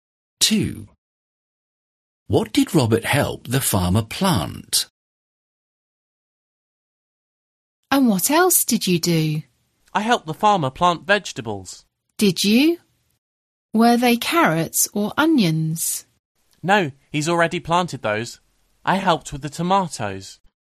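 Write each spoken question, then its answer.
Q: What did Robert help the farmer plant?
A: tomatoes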